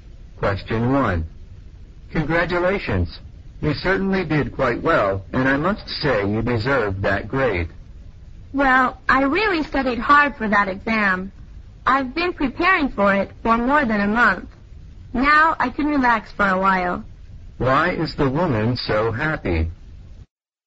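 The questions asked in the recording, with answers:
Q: Why is the woman so happy?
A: She got a good grade on the exam she studied hard for.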